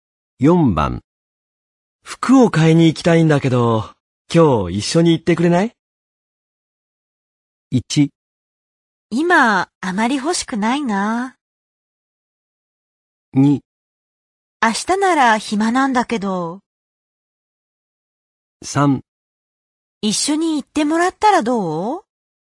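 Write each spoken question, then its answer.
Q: 服を買いに行きたいんだけど、今日一緒に行ってくれない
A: 2: 明日なら暇なんだけど。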